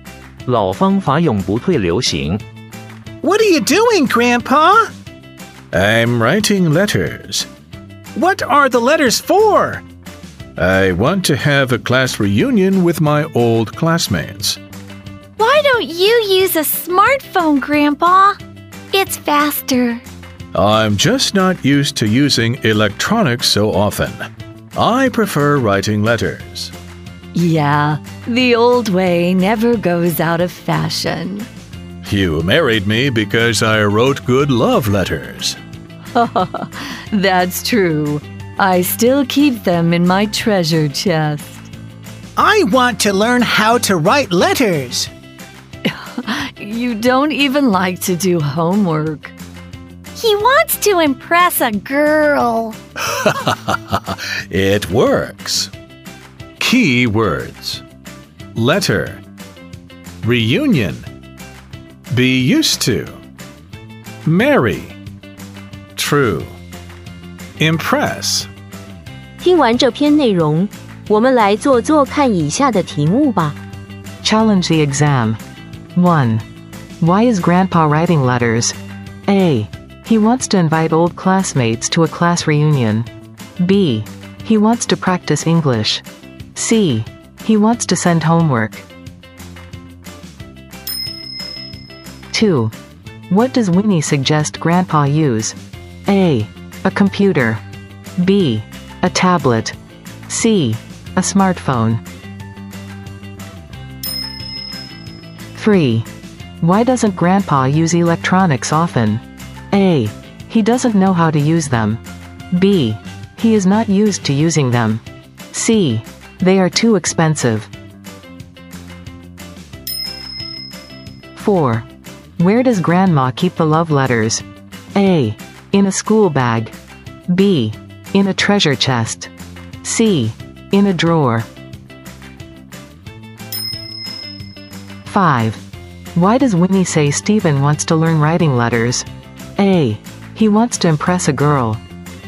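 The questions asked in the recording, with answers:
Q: Why is Grandpa writing letters?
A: A: He wants to invite old classmates to a class reunion.

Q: What does Winnie suggest Grandpa use?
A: C: A smartphone.

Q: Why doesn't Grandpa use electronics often?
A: B: He is not used to using them.

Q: Where does Grandma keep the love letters?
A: B: In a treasure chest.

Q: Why does Winnie say Stephen wants to learn writing letters?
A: A: He wants to impress a girl.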